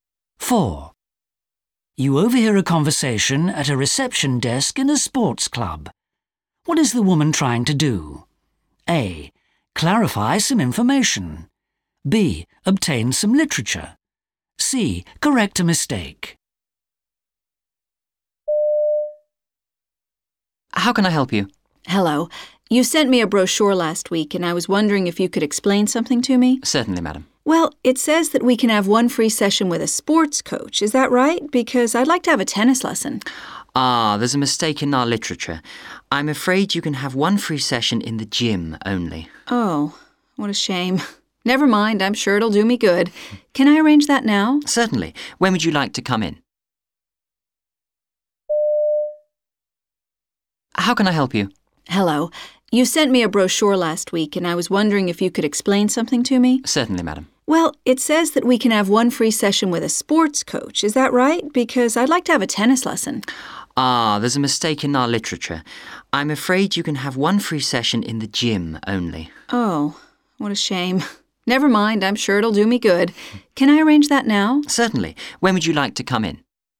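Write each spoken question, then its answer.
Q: What is the woman trying to do?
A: A: Clarify some information.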